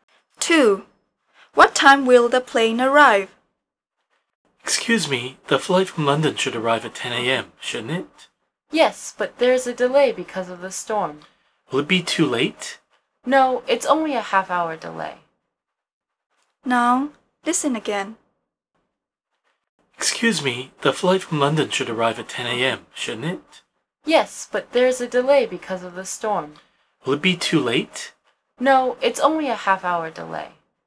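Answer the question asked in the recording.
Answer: 10:30 a.m.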